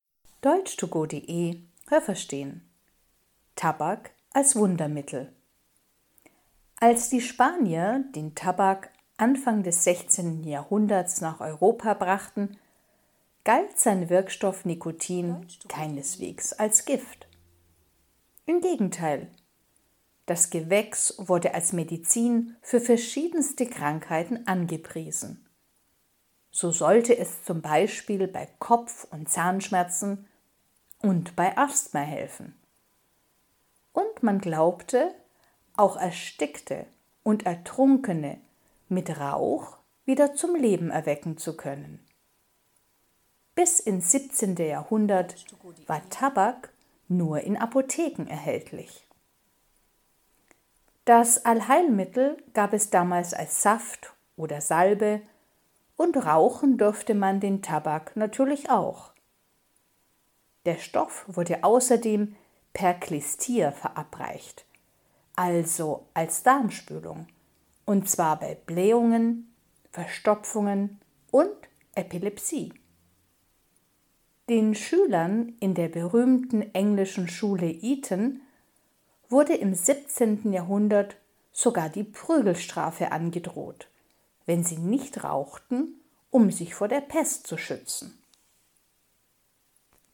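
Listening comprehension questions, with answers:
Haben Sie das gehört? Stimmt diese Aussage?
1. Die Spanier brachten den Tabak Ende des 16. Jahrhunderts nach Europa.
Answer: Nein, das habe ich nicht gehört.

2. Tabak galt von Anfang an als giftig.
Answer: Nein, das habe ich nicht gehört.

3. Man dachte früher, dass man mit Tabak Tote wieder aufwecken kann.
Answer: Ja, das habe ich gehört.

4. Tabak als Medizin gab es früher nur als Saft oder als Salbe.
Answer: Nein, das habe ich nicht gehört.

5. Schüler in der englischen Schule Eton wurden im 17. Jahrhundert gezwungen zu rauchen.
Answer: Ja, das habe ich gehört.

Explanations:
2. Am Anfang dachte man, das ist eine Medizin.
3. Man dachte das vor allem bei Menschen, die erstickt oder ertrunken waren.
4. Man konnte Tabak früher auch rauchen oder bekam Tabak in Form einer Darmspülung.
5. Man dachte, das hilft gegen die Pest.

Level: B1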